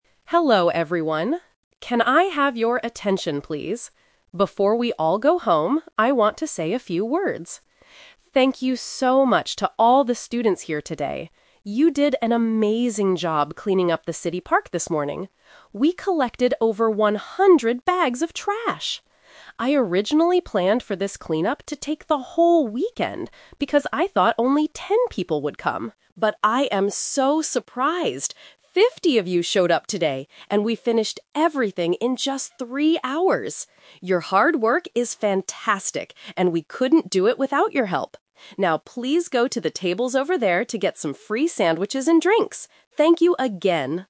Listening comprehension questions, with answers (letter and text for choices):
Listen to the announcement and choose the correct answer (A, B, or C).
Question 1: What did the students do this morning?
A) They cleaned up the park.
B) They planted new trees.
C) They made sandwiches.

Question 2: How many students actually came to help?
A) 10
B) 50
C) 100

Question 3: How long did the work take?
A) Three hours.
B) All day.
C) The whole weekend.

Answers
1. A) They cleaned up the park.
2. B) 50
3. A) Three hours.

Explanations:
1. The organizer says, "You did an amazing job cleaning up the city park this morning." Trap: Option (C) is a trap because "sandwiches" are mentioned at the end of the speech, but the students didn't make them; they are going to eat them. Option (B) is a common volunteer activity but is not mentioned in the audio.
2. The organizer says, "Fifty of you showed up today..." Trap: Option (A) is the "Expectation vs. Reality" trap. The organizer thought only 10 people would come, but 50 actually did. Option (C) is the number of trash bags they collected, not the number of students.
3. The organizer states, "...and we finished everything in just three hours." Trap: Option (C) is the "Twist" trap. The organizer originally planned for it to take the whole weekend, but reality was much faster. Option (B) is not mentioned.

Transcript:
Organizer: Hello, everyone. Can I have your attention, please? Before we all go home, I want to say a few words. Thank you so much to all the students here today. You did an amazing job cleaning up the city park this morning. We collected over one hundred bags of trash! I originally planned for this cleanup to take the whole weekend because I thought only ten people would come. But I am so surprised! Fifty of you showed up today, and we finished everything in just three hours. Your hard work is fantastic, and we couldn't do it without your help. Now, please go to the tables over there to get some free sandwiches and drinks. Thank you again!

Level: A2